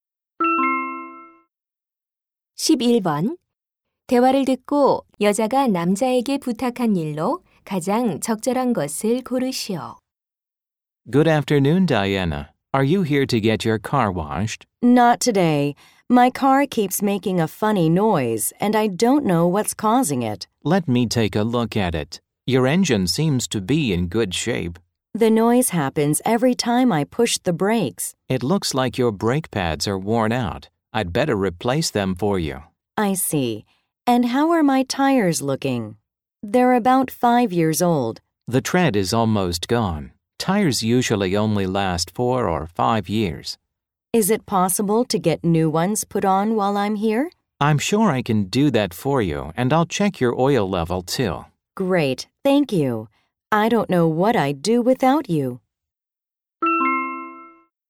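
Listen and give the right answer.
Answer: 타이어 교체하기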